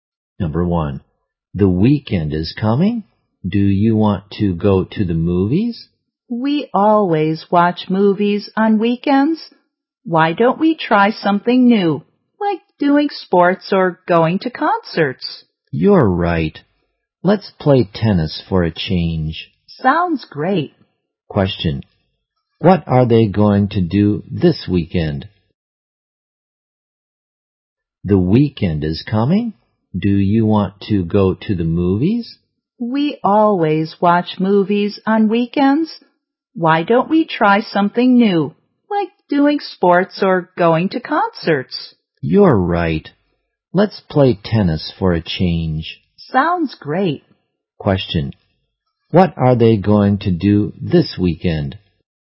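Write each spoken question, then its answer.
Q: What are they going to do this weekend?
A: Play tennis.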